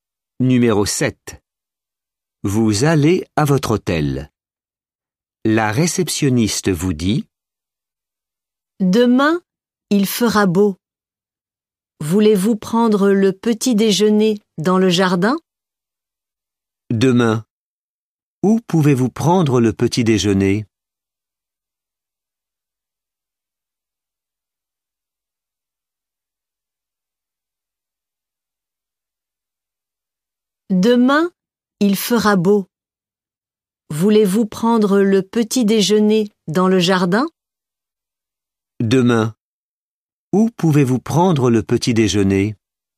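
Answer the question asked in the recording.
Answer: dans le jardin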